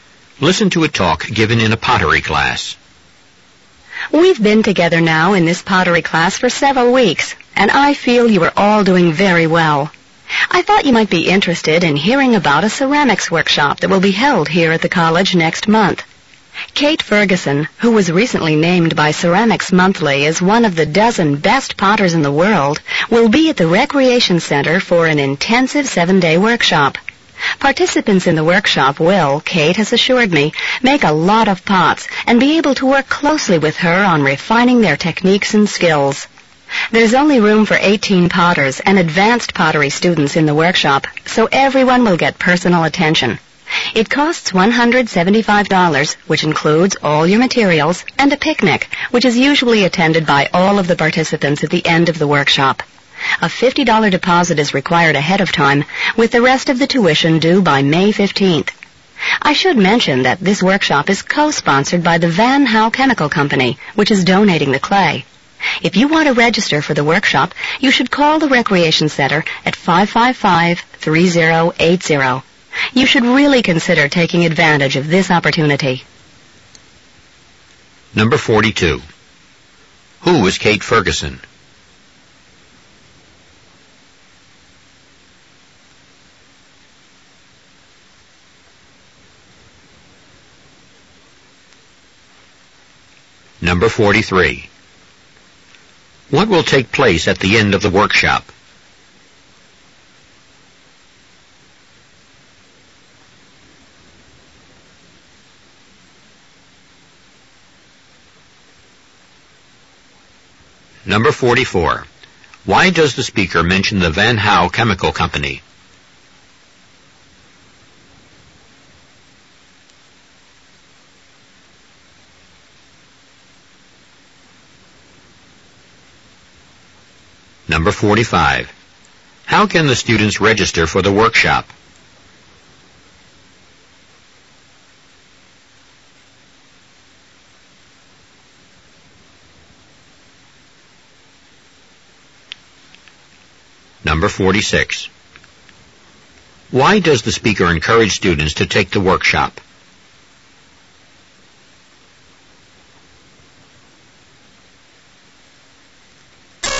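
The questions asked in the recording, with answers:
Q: Who is Kate Ferguson?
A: A world-famous potter, named one of the dozen best potters in the world

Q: What will take place at the end of the workshop?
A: A picnic

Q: Why does the speaker mention the Van Hau Chemical Company?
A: It co-sponsors the workshop and donates the clay

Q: How can the students register for the workshop?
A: By calling the Recreation Center at 555-3080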